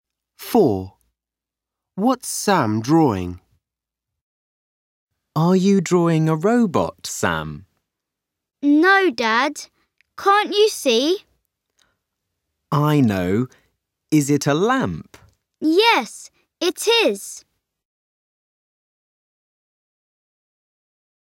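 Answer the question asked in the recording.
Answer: A lamp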